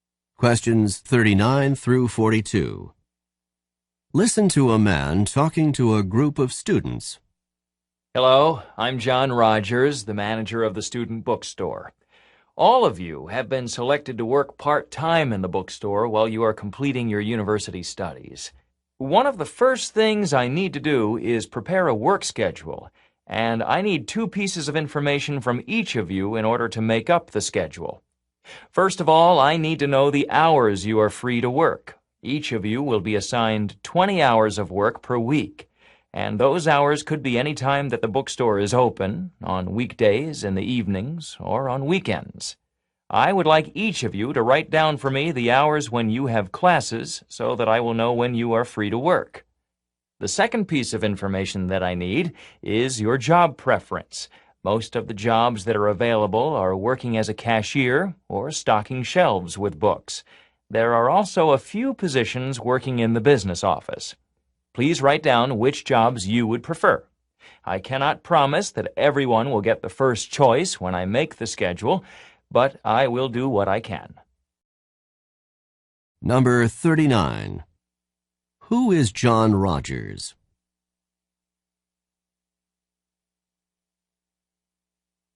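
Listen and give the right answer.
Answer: The manager of the student bookstore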